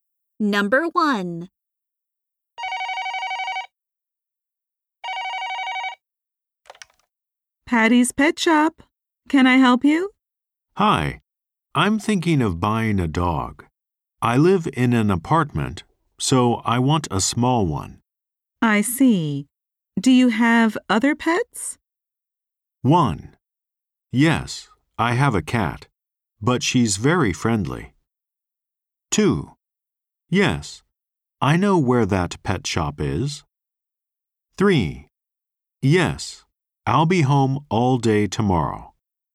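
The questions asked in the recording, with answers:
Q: I see. Do you have other pets?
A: 1: Yes, I have a cat, but she's very friendly.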